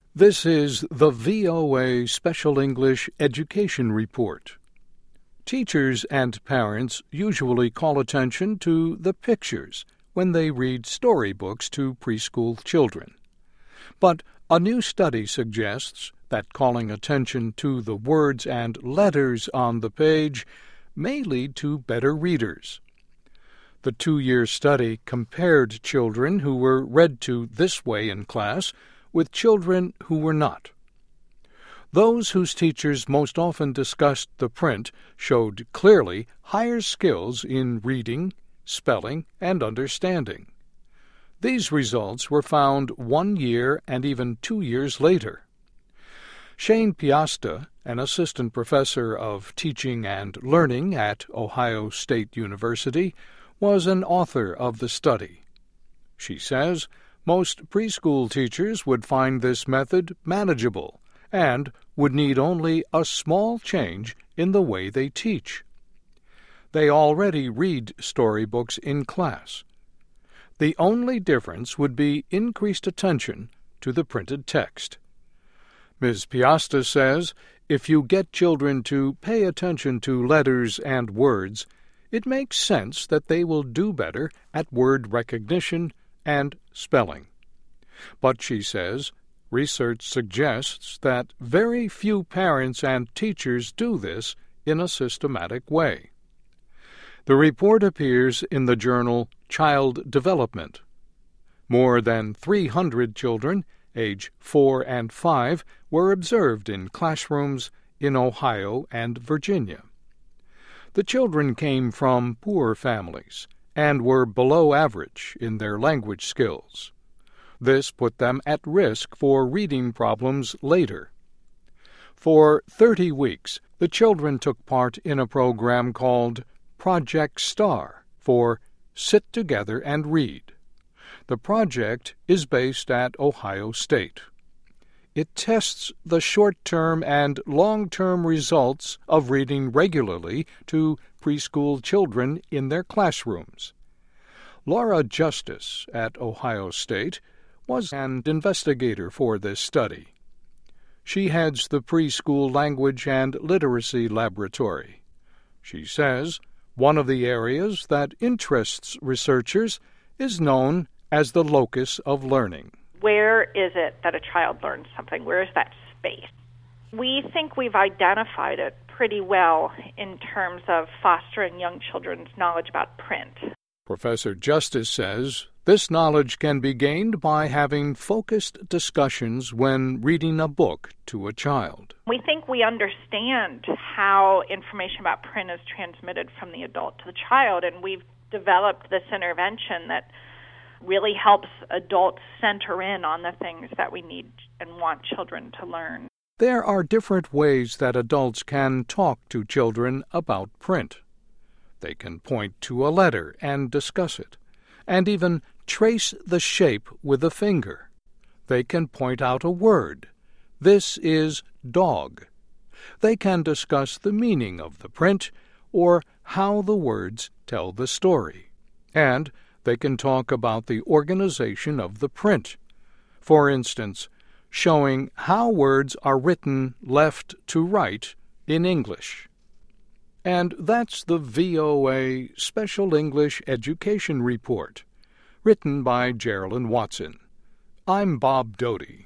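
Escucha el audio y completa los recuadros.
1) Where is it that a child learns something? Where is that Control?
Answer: space

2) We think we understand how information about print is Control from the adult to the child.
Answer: transmitted

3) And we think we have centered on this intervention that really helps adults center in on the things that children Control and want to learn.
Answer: need

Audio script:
This is the VOA Special English Education Report.
Teachers and parents usually call attention to the Control when they read storybooks to preschool children. But a new study suggests that calling attention to the words and Control on the page may lead to better readers.
The two-year study compared children who were read to this way in class with children who were not. Those whose teachers most often discussed the Control showed clearly higher skills in reading, spelling and understanding. 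These results were found one year and even two years later.
Shayne Piasta, an assistant professor of teaching and learning at Ohio State University, was an author of the study. She says most Control teachers would find this method manageable and would need only a small change in the way they teach. They already read storybooks in class. The only difference would be Control attention to the printed text.
Ms. Piasta says if you get children to pay attention to letters and words, it makes sense that they will do better at word recognition and Control. But she says research suggests that very few parents and teachers do this in a systematic way.
The report appears in the journal Child Development.
More than three hundred children age four and five were observed in classrooms in Ohio and Virginia. The children came from poor families and were below Control in their language skills. This put them at risk for reading problems later.
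For Control weeks, the children took part in a program called Project STAR, for Sit Together And Read. The project is based at Ohio State. It tests the short-term and long-term results of reading regularly to preschool children in their classrooms.
Laura Justice at Ohio State was an investigator for the study. She heads the Preschool Language and Literacy Laboratory. She says one of the Control that interests researchers is known as the "locus of learning."
LAURA JUSTICE: "Where is it that a child learns something? Where is that Control? We think we have identified it pretty well in terms of fostering some children's knowledge about print."
Professor Justice says this knowledge can be gained by having focused discussions when reading a book to a child.
LAURA JUSTICE: "We think we understand how information about print is Control from the adult to the child.
There are different ways that adults can talk to children about print. 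They can point to a letter and discuss it, and even trace the Control with a finger. They can point out a word: "This is 'dog.'" They can discuss the meaning of the print or how the words tell the story. And they can talk about the Control of the print -- for instance, showing how words are written left to right in English.

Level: Nivel Principiantes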